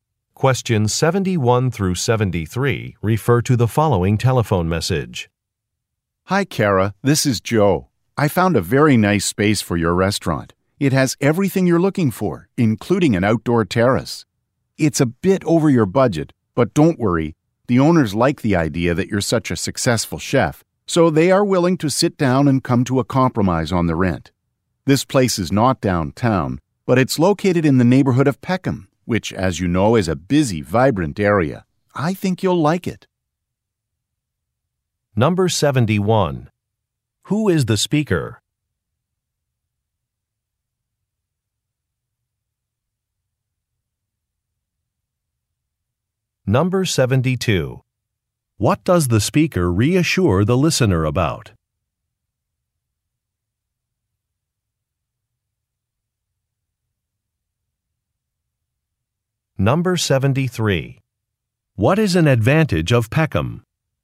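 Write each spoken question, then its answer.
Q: What does the speaker reassure the listener about?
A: The rent is negotiable; the owners will compromise on it

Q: What is an advantage of Peckham?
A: It is a busy, vibrant area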